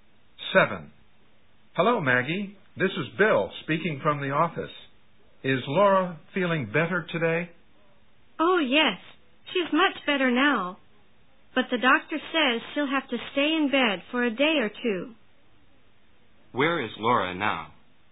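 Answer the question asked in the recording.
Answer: In bed at home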